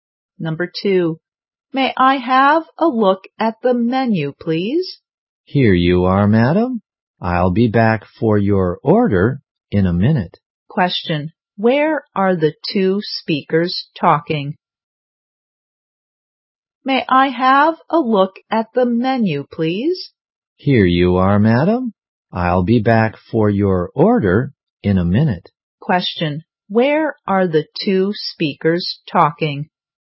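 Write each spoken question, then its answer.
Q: Where are the two speakers talking?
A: In a restaurant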